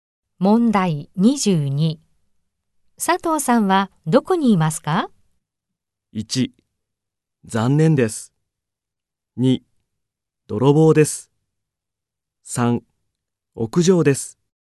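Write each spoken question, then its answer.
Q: 佐藤さんはどこにいますか?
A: 3: 屋上です。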